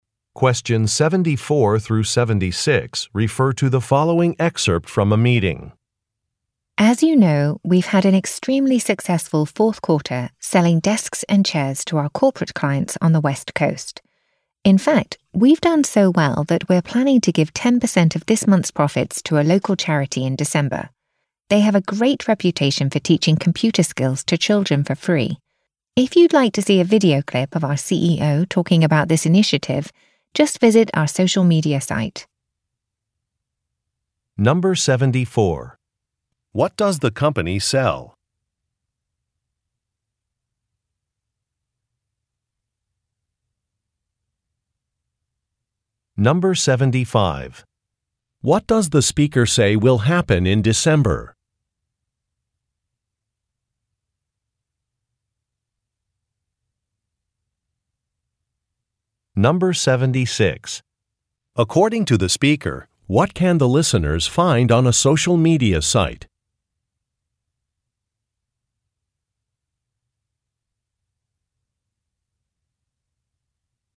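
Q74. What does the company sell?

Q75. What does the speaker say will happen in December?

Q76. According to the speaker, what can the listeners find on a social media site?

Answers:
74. Office furniture (desks and chairs)
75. The company will give some of its profits to a local charity
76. A video clip of the CEO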